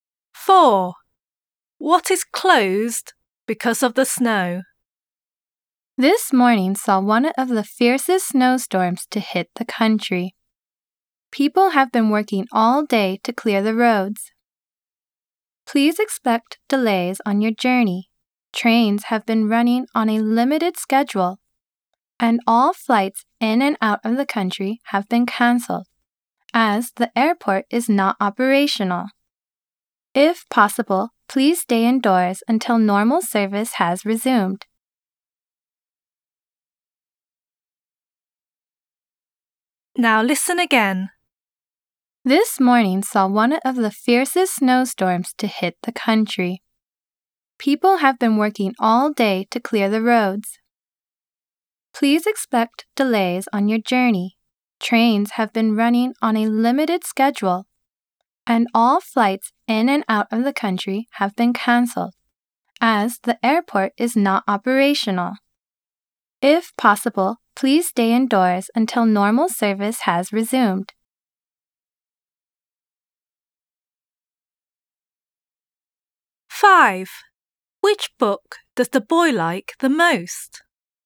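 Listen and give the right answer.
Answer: the airport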